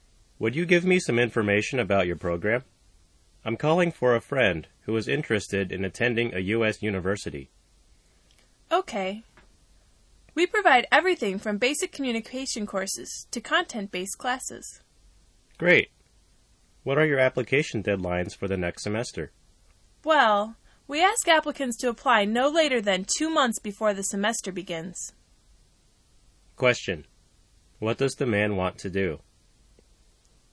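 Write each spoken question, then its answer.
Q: What does the man want to do?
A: Get information about the university's program for a friend who wants to attend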